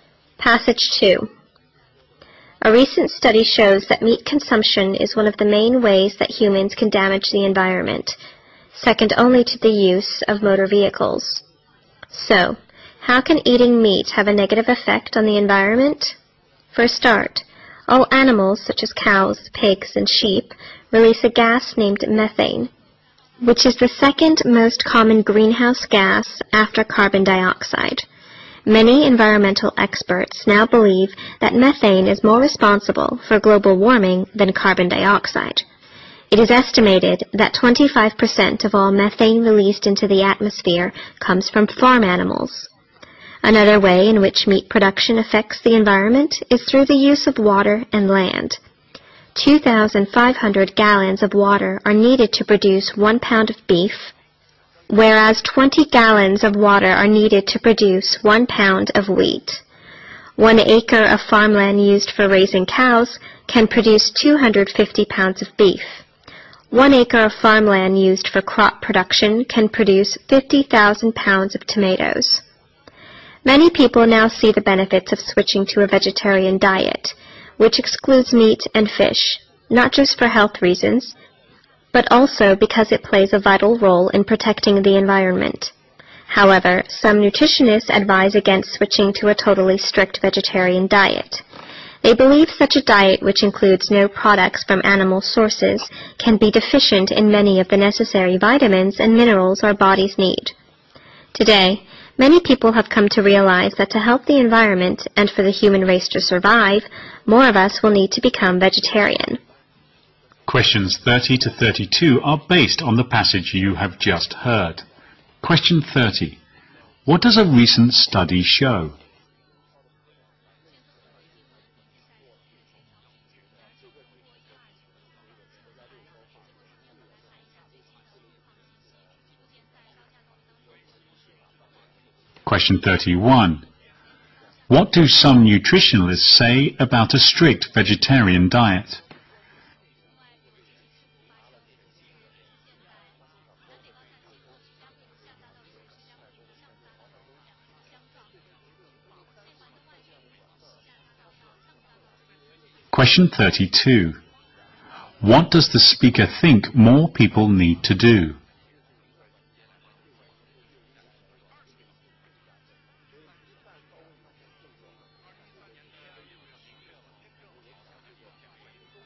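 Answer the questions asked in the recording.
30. Eating meat is one of the main ways humans damage the environment, second only to motor vehicles
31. It may lack necessary vitamins and minerals
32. Become vegetarian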